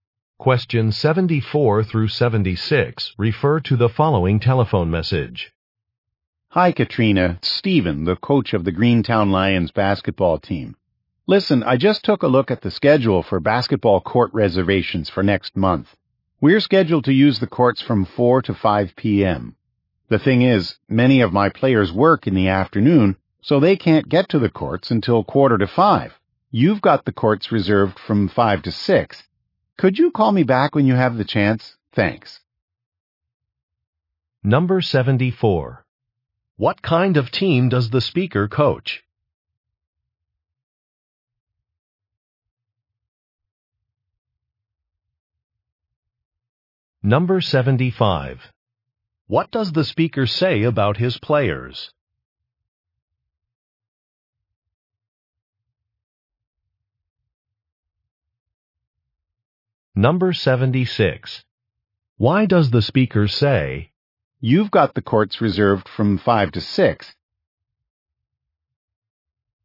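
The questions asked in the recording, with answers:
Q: What kind of team does the speaker coach?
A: A basketball team

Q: What does the speaker say about his players?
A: Many of them work in the afternoon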